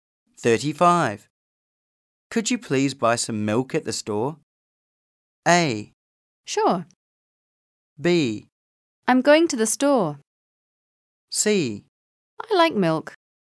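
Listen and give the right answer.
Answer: A: Sure.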